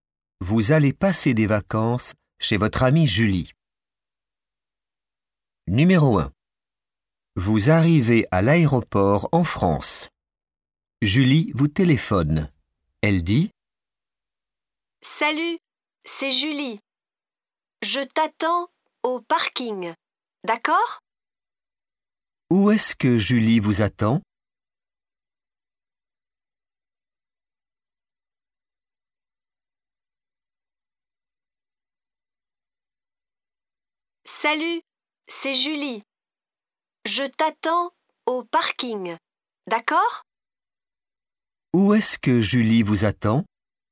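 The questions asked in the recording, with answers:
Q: Où est-ce que Julie vous attend ?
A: Au parking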